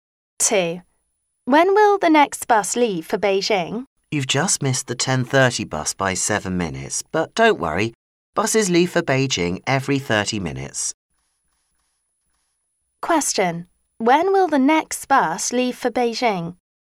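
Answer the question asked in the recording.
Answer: At 11:00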